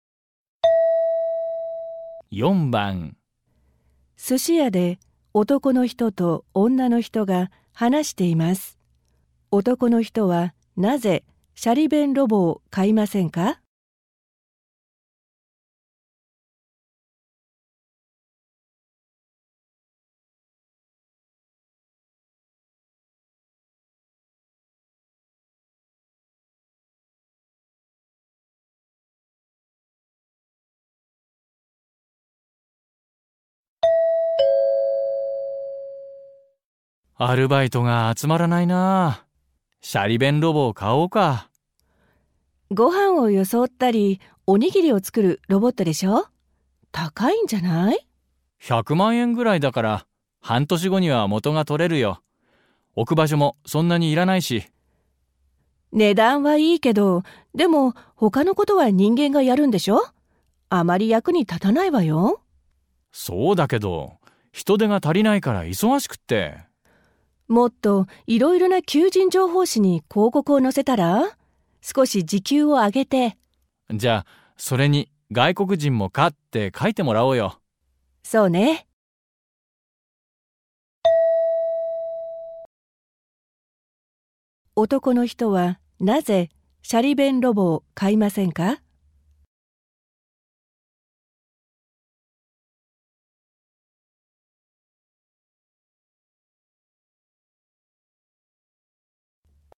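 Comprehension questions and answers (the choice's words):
問題2では、まず質問を聞いてください。そのあと、問題用紙のせんたくしを読んでください。読む時間があります。それから話を聞いて、問題用紙の1から4の中から、最もよいものを一つ選んでください。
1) 男の人はなぜシャリ弁ロボを買いませんか。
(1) 値段が高すぎるから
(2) 大きくて置く場所がないから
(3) できることが少ないから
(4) 外国人がやとえるから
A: できることが少ないから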